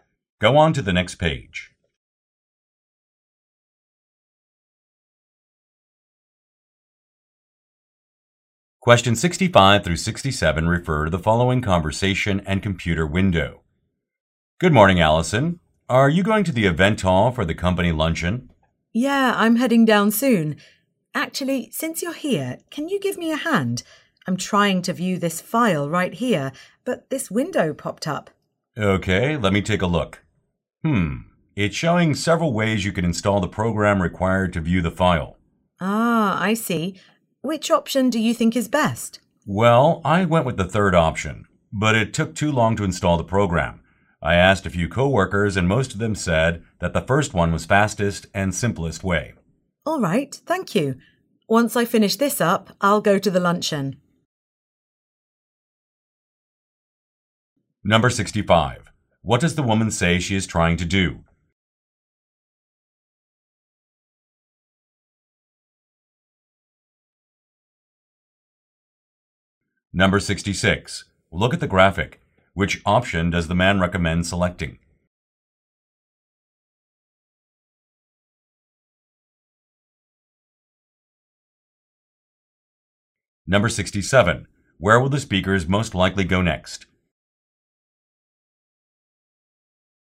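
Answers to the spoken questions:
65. View a file
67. To the company luncheon in the event hall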